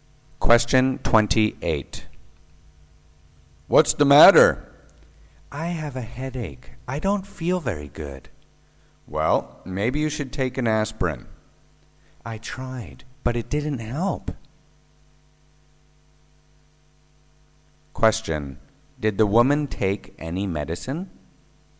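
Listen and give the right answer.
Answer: Yes, she took an aspirin but it didn't help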